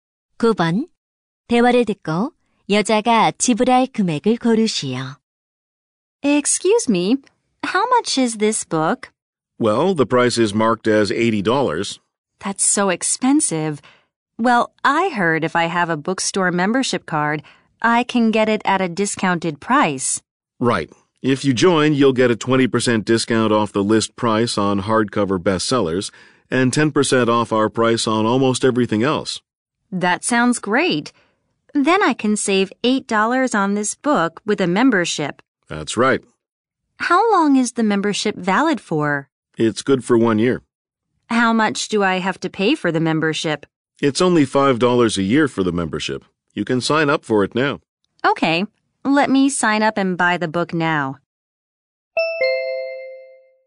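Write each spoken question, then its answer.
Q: 대화를 듣고 여자가 지불할 금액을 고르시오.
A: 77달러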